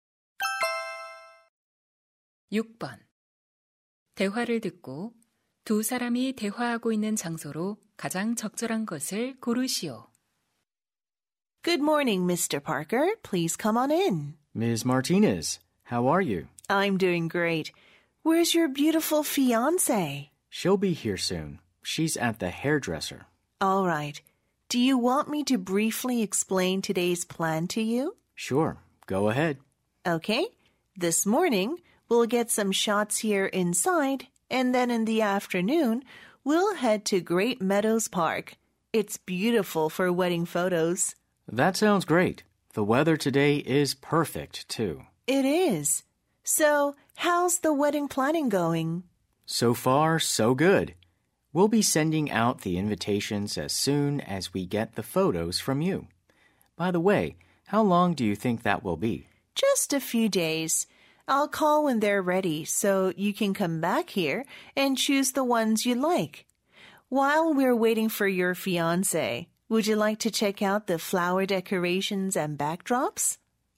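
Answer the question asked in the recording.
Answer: 사진 스튜디오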